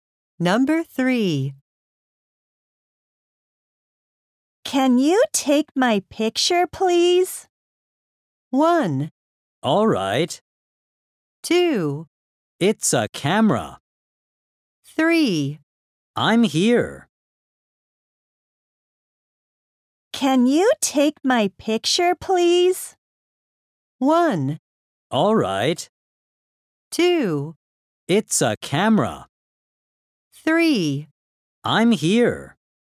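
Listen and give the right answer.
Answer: 1: All right.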